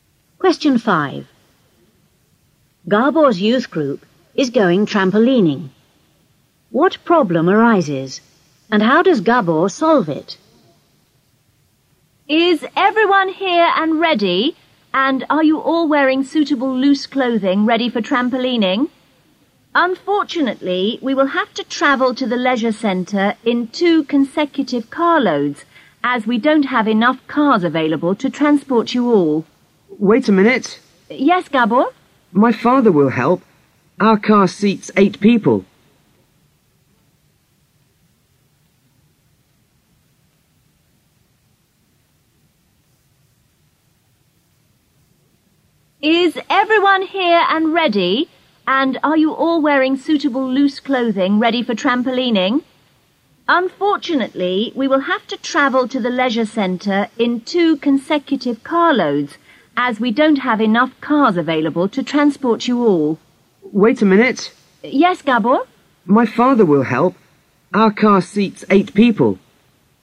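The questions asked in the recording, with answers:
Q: What problem arises, and how does Gabor solve it?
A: There aren't enough cars, so they would have to go in two carloads; Gabor's father will help, as his car seats 8 people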